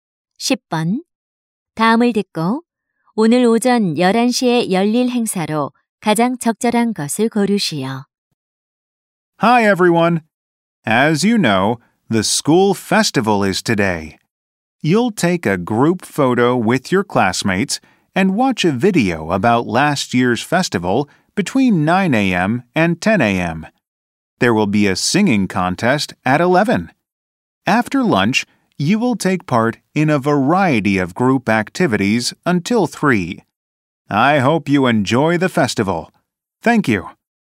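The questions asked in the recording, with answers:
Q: 다음을 듣고 오늘 오전 11시에 열릴 행사로 가장 적절한 것을 고르시오.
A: 노래 경연 대회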